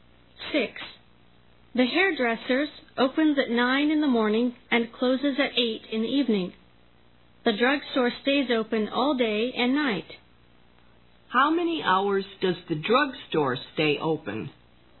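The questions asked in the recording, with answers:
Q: How many hours does the drugstore stay open?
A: 24 hours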